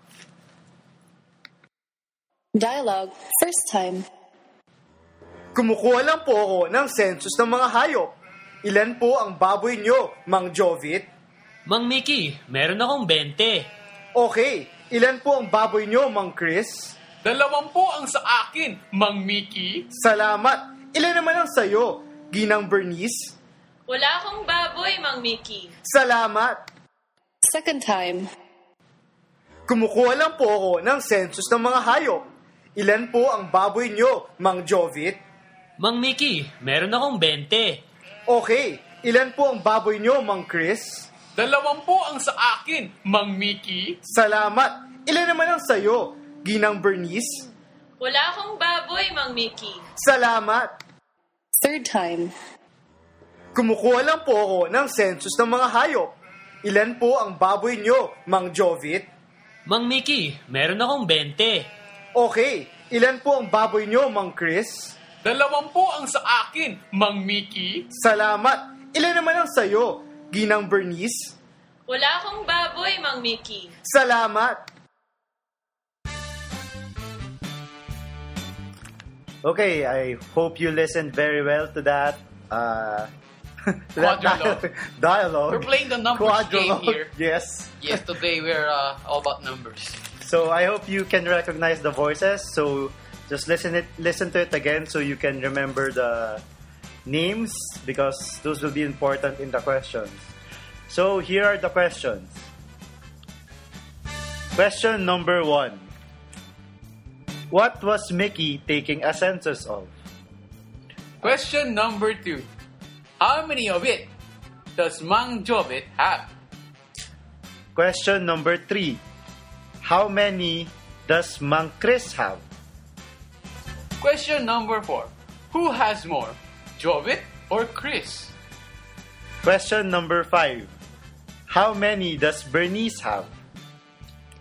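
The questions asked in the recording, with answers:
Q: What was Mickey taking a census of?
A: Pigs (animals)

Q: How many of it does Mang Jovit have?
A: 20

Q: Who has more, Jovit or Chris?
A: Jovit

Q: How many does Bernice have?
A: None (0)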